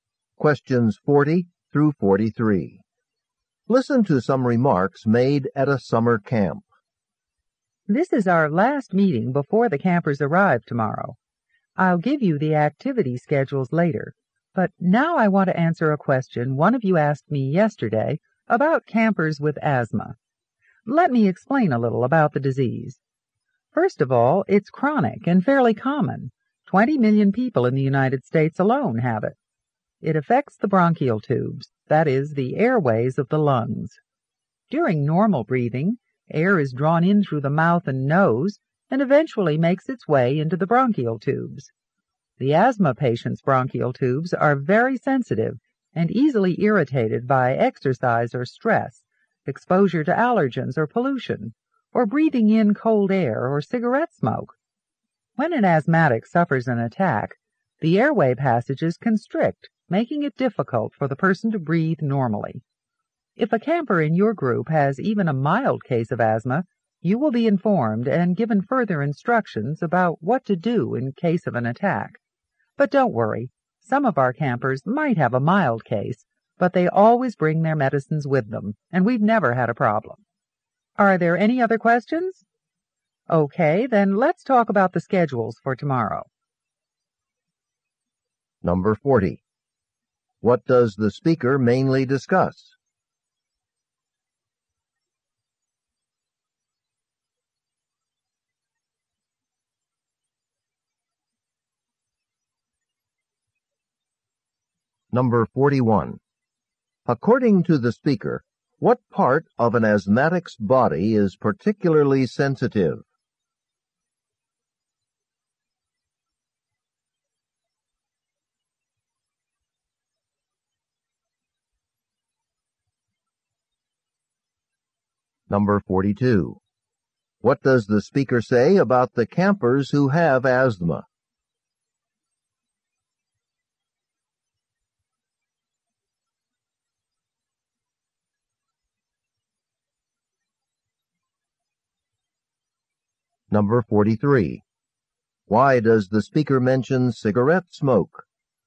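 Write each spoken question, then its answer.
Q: What does the speaker mainly discuss?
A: Asthma

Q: According to the speaker, what part of an asthmatic's body is particularly sensitive?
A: The bronchial tubes

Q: What does the speaker say about the campers who have asthma?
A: They always bring their medicines, and there has never been a problem

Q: Why does the speaker mention cigarette smoke?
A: It can irritate an asthmatic's bronchial tubes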